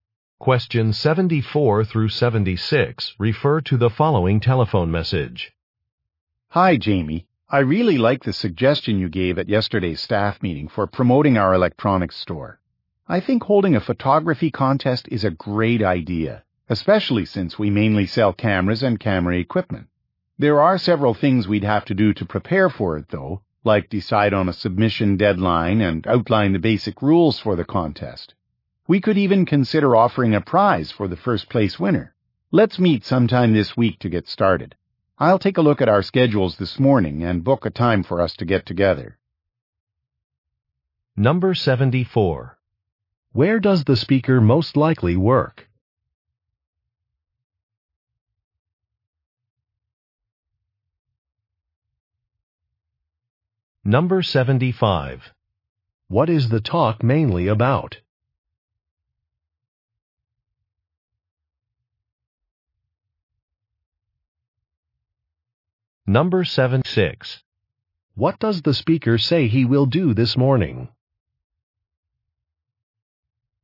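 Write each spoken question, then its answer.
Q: Where does the speaker most likely work?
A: At an electronics store

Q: What is the talk mainly about?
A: Holding a photography contest

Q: What does the speaker say he will do this morning?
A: Check schedules and book a meeting time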